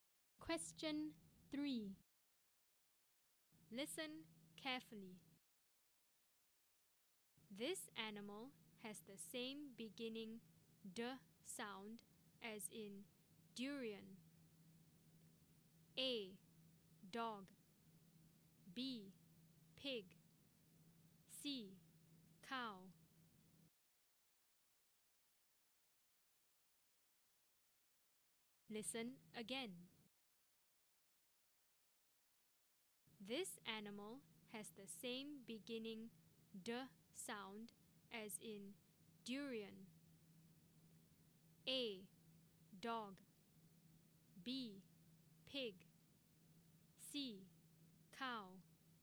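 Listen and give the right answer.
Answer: A: Dog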